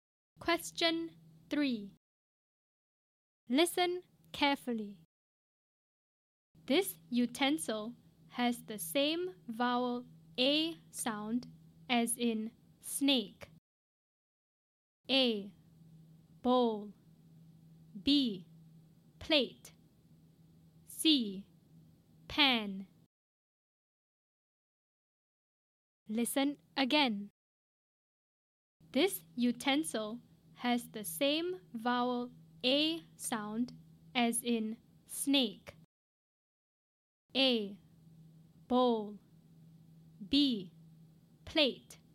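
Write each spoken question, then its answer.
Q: This utensil has the same vowel A sound as in snake.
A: B: Plate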